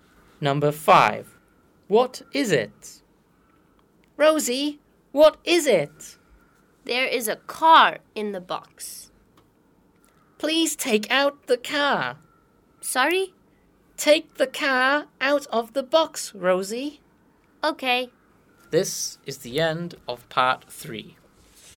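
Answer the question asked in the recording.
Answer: a car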